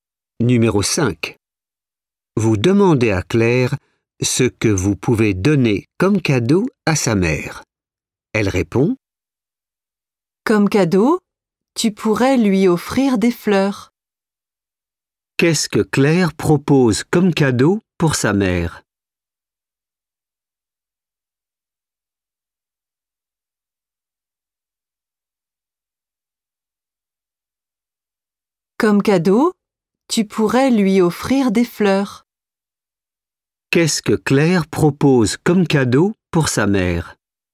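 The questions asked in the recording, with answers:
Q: Qu'est-ce que Claire propose comme cadeau pour sa mère?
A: Des fleurs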